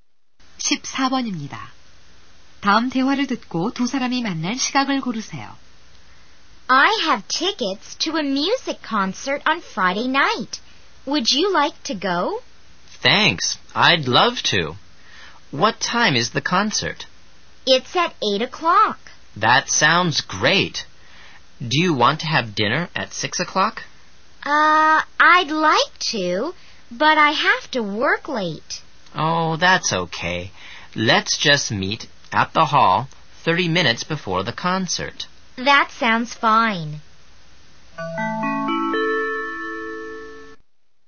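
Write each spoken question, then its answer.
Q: 다음 대화를 듣고 두 사람이 만날 시각을 고르세요.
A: 7시 30분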